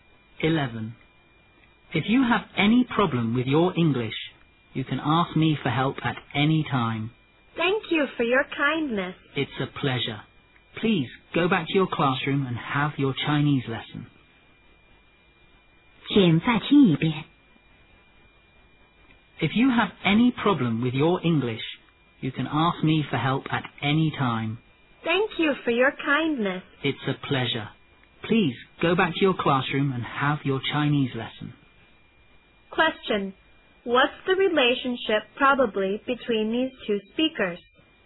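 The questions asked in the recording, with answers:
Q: What's the relationship probably between these two speakers?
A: Teacher and student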